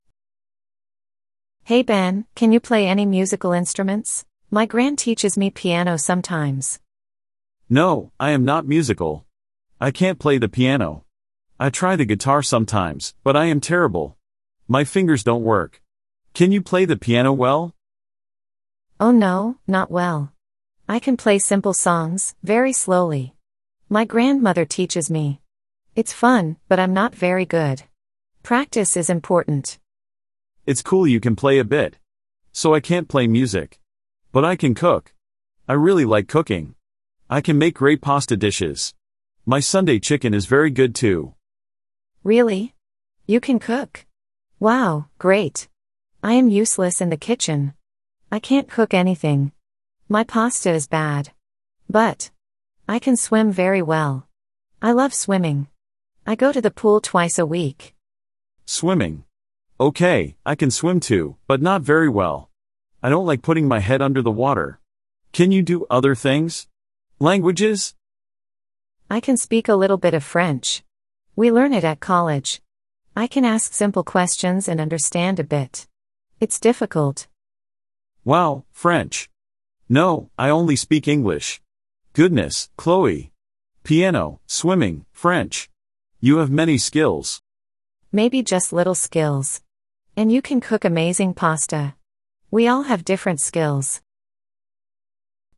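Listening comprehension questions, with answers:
Read the sentences below. Are they True or False? Choose the correct answer.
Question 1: Ben can play the piano well.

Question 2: Chloe is learning the guitar.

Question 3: Ben likes cooking pasta and chicken.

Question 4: Chloe is very good at cooking.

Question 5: Ben likes putting his head under water when swimming.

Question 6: Chloe can speak French very well.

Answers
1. False
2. False
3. True
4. False
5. False
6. False

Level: Beginner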